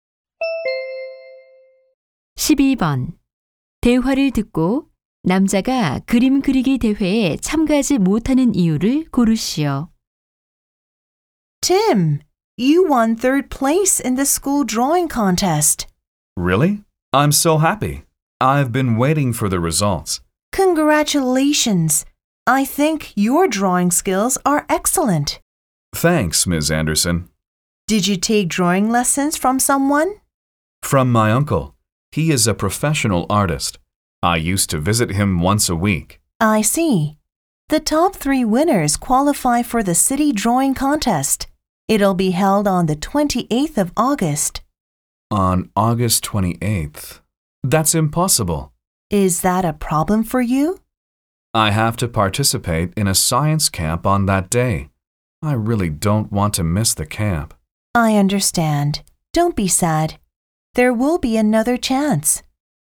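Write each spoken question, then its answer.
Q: 대화를 듣고 남자가 그림 그리기 대회에 참가하지 못하는 이유를 고르시오.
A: 같은 날 과학 캠프에 참가해야 해서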